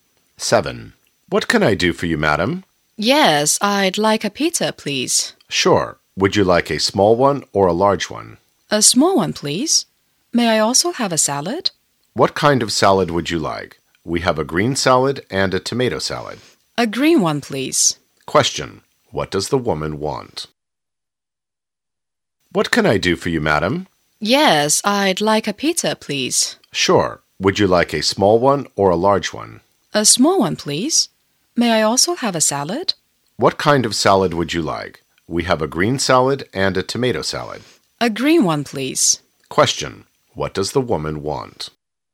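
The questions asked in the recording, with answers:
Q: Question. What does the woman want?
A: A small pizza and a green salad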